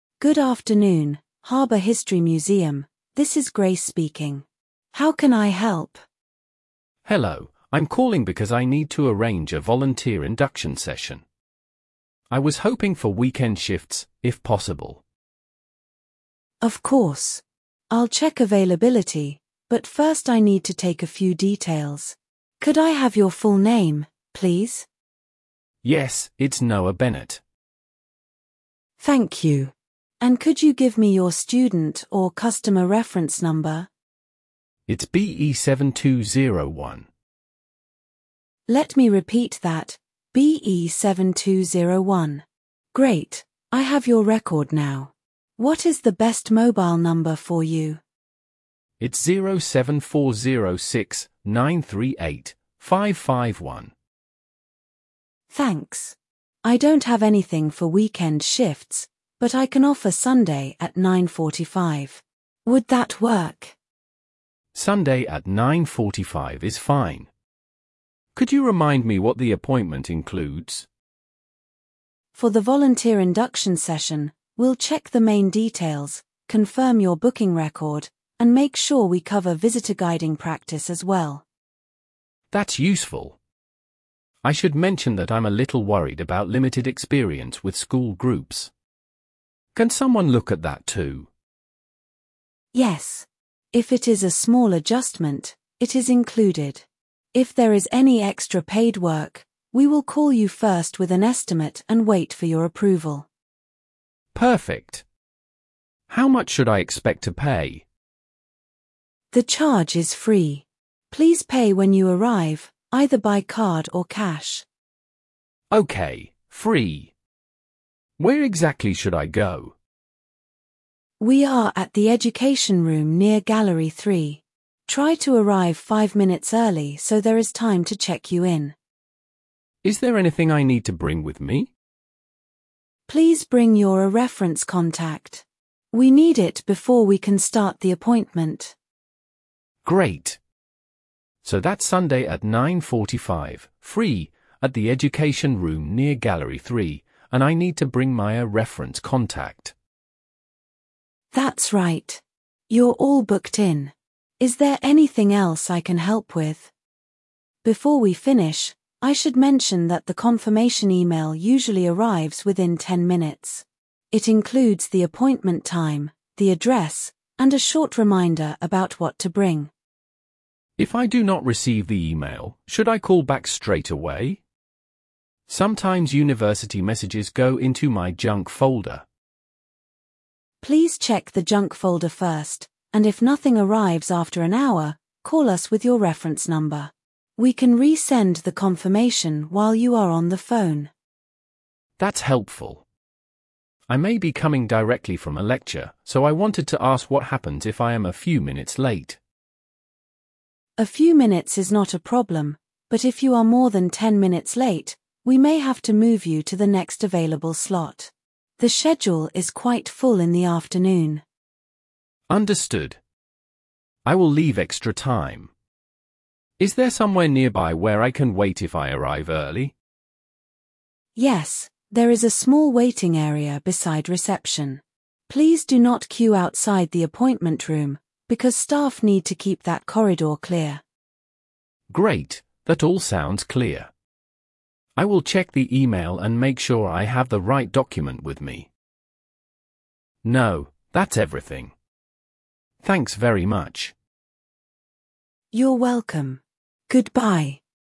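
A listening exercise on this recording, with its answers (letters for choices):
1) What service does the caller want to arrange?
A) A refund request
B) Volunteer induction session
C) A lecture ticket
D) A library renewal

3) What time is the appointment?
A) Nine fifteen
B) nine forty-five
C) Two o'clock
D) Six forty-five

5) Where should the caller go?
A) The education room near gallery three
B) The main library entrance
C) Room twenty on the top floor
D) The city bus station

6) What must the caller bring?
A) A printed map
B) A reference contact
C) A passport photo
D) A bank statement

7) What will happen if extra paid work is needed?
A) It will be done automatically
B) The booking will be cancelled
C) The caller will be contacted first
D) The fee will be doubled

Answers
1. B
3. B
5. A
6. B
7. C

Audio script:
Staff: Good afternoon, Harbour History Museum, this is Grace speaking. How can I help?
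Student: Hello, I'm calling because I need to arrange a volunteer induction session. I was hoping for weekend shifts, if possible.
Staff: Of course. I'll check availability, but first I need to take a few details. Could I have your full name, please?
Student: Yes, it's Noah Bennett.
Staff: Thank you. And could you give me your student or customer reference number?
Great, I have your record now. What is the best mobile number for you?
Staff: Thanks. I don't have anything for weekend shifts, but I can offer Sunday at nine forty-five. Would that work?
Could you remind me what the appointment includes?
Staff: For the volunteer induction session, we'll check the main details, confirm your booking record, and make sure we cover visitor-guiding practice as well.
Student: That's useful. I should mention that I'm a little worried about limited experience with school groups. Can someone look at that too?
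Staff: Yes. If it is a small adjustment, it is included. If there is any extra paid work, we will call you first with an estimate and wait for your approval.
Student: Perfect. How much should I expect to pay?
Staff: The charge is free. Please pay when you arrive, either by card or cash.
Student: Okay, free. Where exactly should I go?
Staff: We are at the education room near gallery three. Try to arrive five minutes early so there is time to check you in.
Student: Is there anything I need to bring with me?
Staff: Please bring your a reference contact.
So that's Sunday at nine forty-five, free, at the education room near gallery three, and I need to bring my a reference contact.
Staff: That's right. You're all booked in. Is there anything else I can help with?
Staff: Before we finish, I should mention that the confirmation email usually arrives within ten minutes. It includes the appointment time, the address, and a short reminder about what to bring.
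Student: If I do not receive the email, should I call back straight away? Sometimes university messages go into my junk folder.
Staff: Please check the junk folder first, and if nothing arrives after an hour, call us with your reference number. We can resend the confirmation while you are on the phone.
Student: That's helpful. I may be coming directly from a lecture, so I wanted to ask what happens if I am a few minutes late.
Staff: A few minutes is not a problem, but if you are more than ten minutes late, we may have to move you to the next available slot. The schedule is quite full in the afternoon.
Student: Understood. I will leave extra time. Is there somewhere nearby where I can wait if I arrive early?
Staff: Yes, there is a small waiting area beside reception. Please do not queue outside the appointment room, because staff need to keep that corridor clear.
Student: Great, that all sounds clear. 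I will check the email and make sure I have the right document with me.
Student: No, that's everything. Thanks very much.
Staff: You're welcome. Goodbye.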